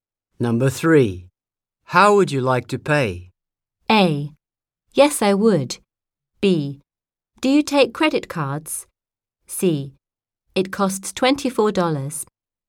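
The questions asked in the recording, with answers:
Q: How would you like to pay?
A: B: Do you take credit cards?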